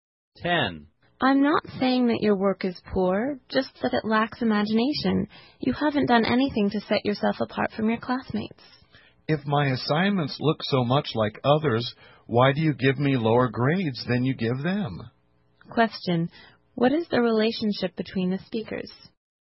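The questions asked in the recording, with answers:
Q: What is the relationship between the speakers?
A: Teacher and student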